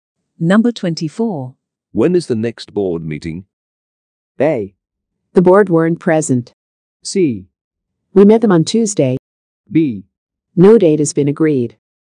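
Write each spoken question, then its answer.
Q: When is the next board meeting?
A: B: No date has been agreed.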